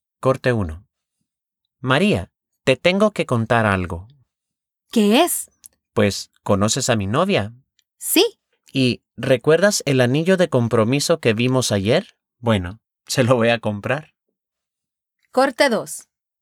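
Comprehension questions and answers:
Escucha los cortes y contesta las preguntas:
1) ¿Quién tiene que contarle algo a quién? (Who has to tell something to whom?)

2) ¿Conoce María a la novia de Juan?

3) ¿Qué va a hacer Juan para su novia?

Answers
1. Juan tiene que contarle algo a María.
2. Sí, la conoce.
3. Va a comprarle el anillo de compromiso.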